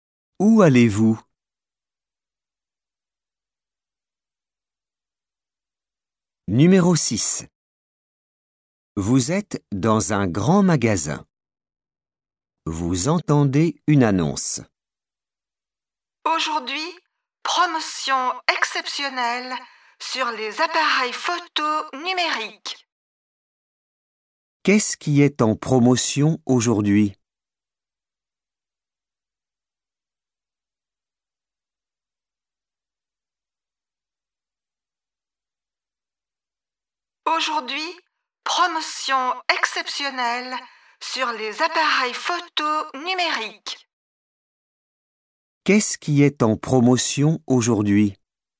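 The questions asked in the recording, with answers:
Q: Qu'est-ce qui est en promotion aujourd'hui?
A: Les appareils photo numériques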